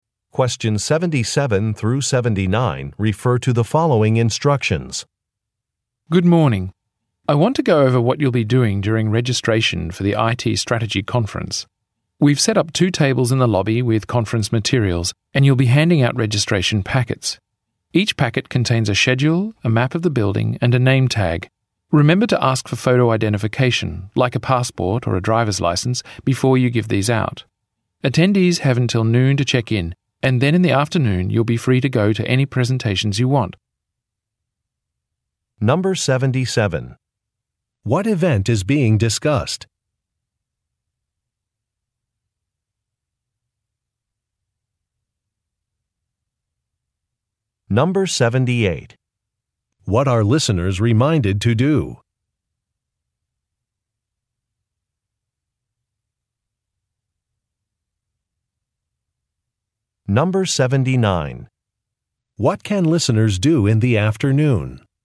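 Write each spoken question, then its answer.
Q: What event is being discussed?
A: An IT strategy conference

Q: What are listeners reminded to do?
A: Ask for photo identification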